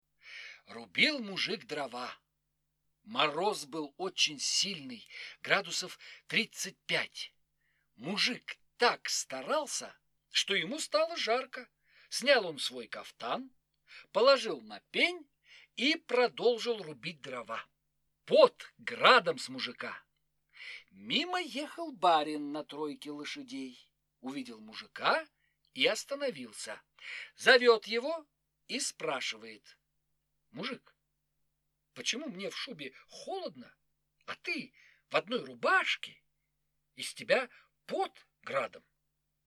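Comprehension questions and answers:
Прослушайте фрагмент сказки. Ответьте на вопрос: почему в мороз мужик снял свой кафтан?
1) почему в мороз мужик снял свой кафтан?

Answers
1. Мужик так старался рубить дрова, что ему стало жарко.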